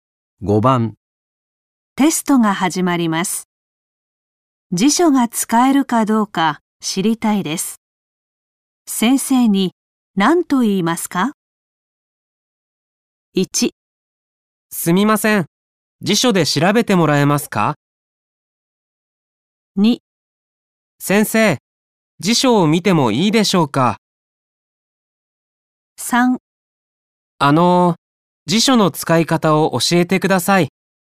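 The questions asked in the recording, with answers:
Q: 先生に何と言いますか?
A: 2: 先生、辞書を見てもいいでしょうか?

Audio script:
1
すみません、辞書で調べてもらえますか。
2
先生、辞書を見てもいいでしょうか。
3
あのう、辞書の使い方を教えてください。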